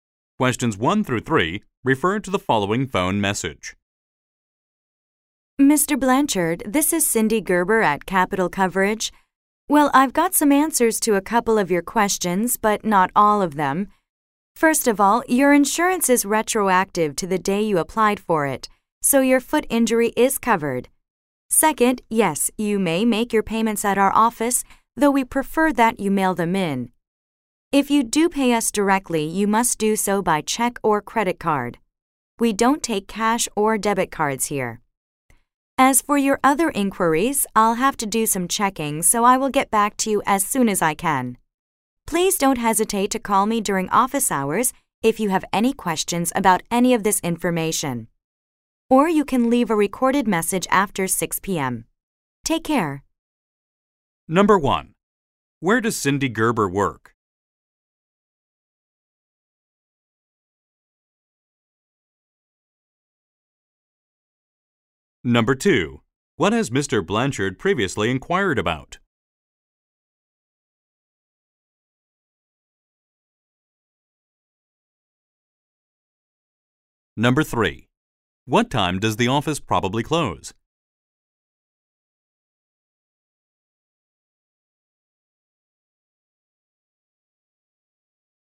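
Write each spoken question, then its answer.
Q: Where does Cindy Gerber work?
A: At an insurance company (Capital Coverage)

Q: What time does the office probably close?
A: At 6 p.m.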